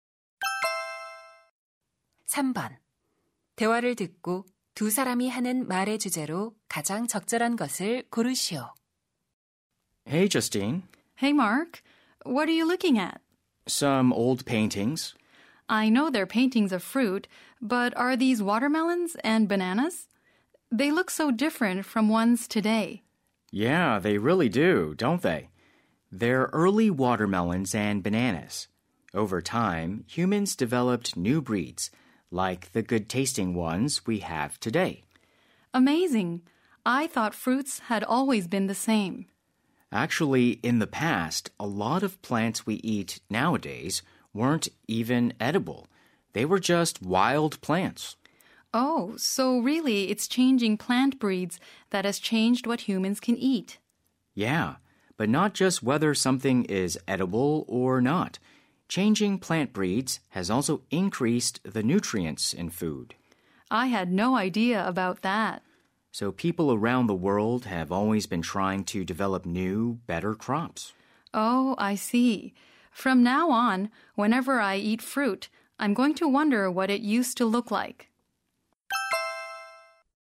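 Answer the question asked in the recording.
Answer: 품종 개량이 인간이 먹는 작물을 변화시켜 온 과정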